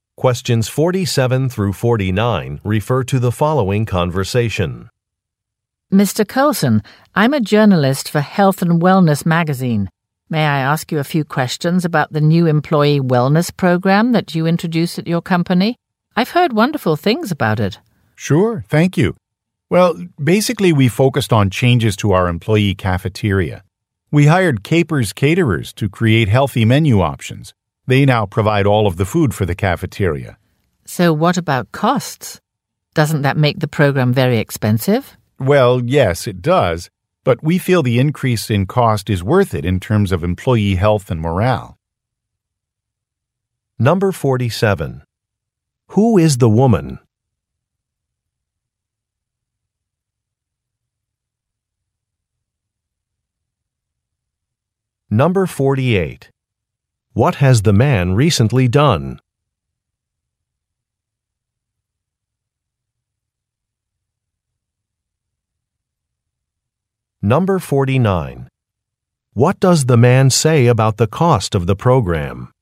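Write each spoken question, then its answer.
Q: Who is the woman?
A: A journalist for Health and Wellness magazine

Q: What has the man recently done?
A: Introduced an employee wellness program with healthy cafeteria food

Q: What does the man say about the cost of the program?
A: It is expensive but worth it for employee health and morale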